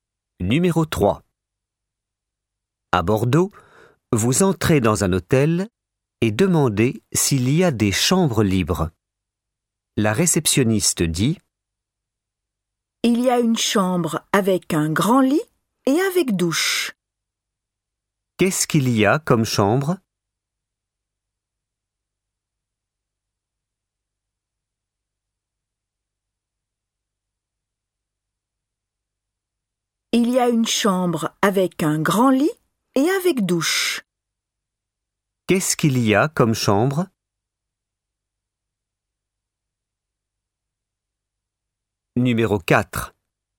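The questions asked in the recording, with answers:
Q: Qu'est-ce qu'il y a comme chambre?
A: Une chambre avec un grand lit et avec douche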